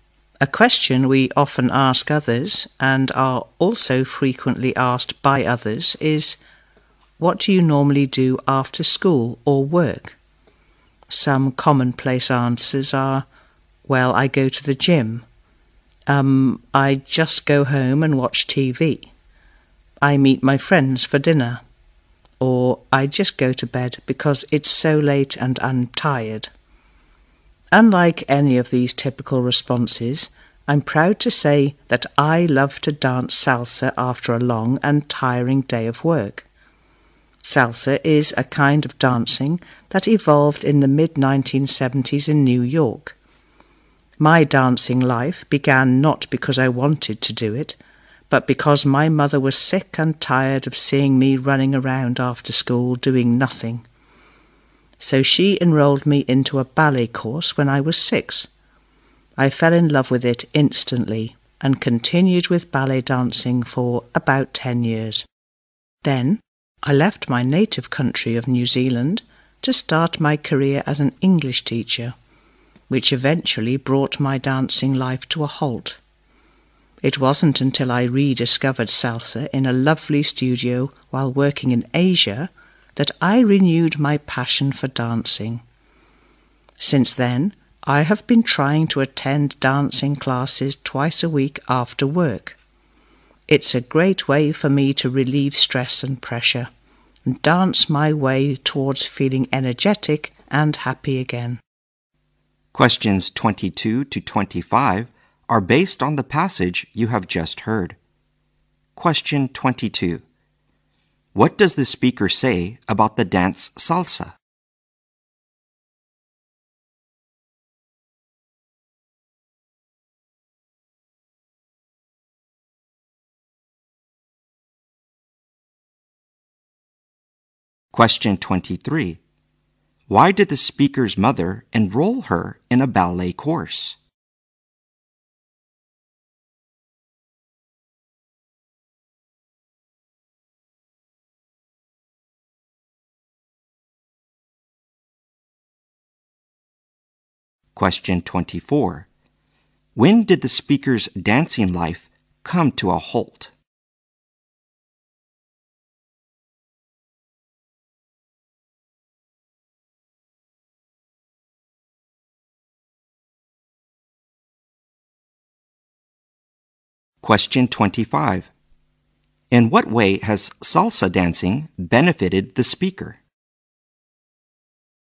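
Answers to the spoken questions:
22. It evolved in the mid-1970s in New York.
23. She was tired of seeing her running around after school doing nothing.
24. When she left New Zealand to start her career as an English teacher.
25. It relieves stress and pressure and makes her feel energetic and happy.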